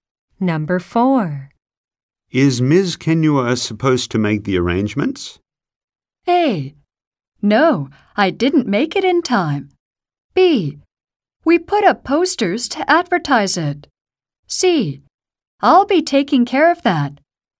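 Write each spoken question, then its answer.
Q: Is Ms. Kenua supposed to make the arrangements?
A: C: I'll be taking care of that.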